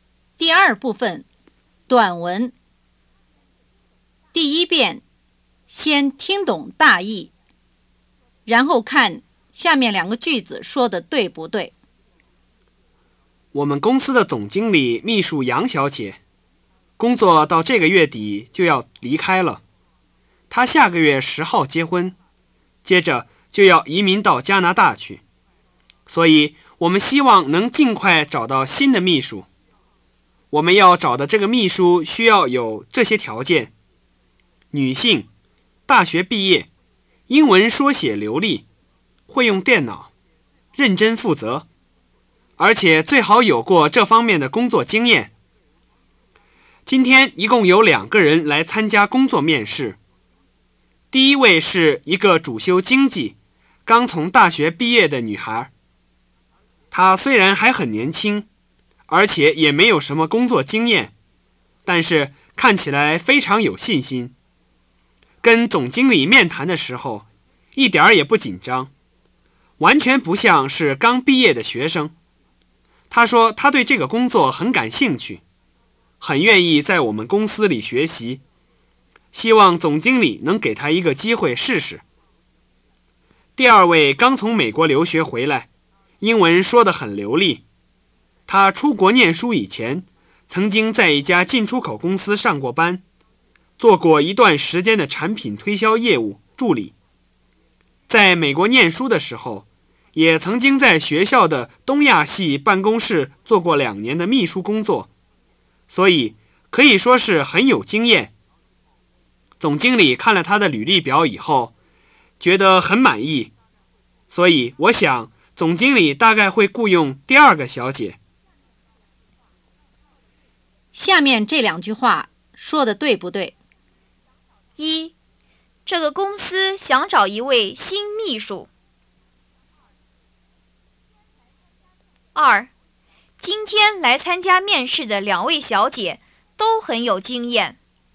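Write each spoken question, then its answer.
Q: 今天来参加面试的2位小姐都很有经验。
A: 不对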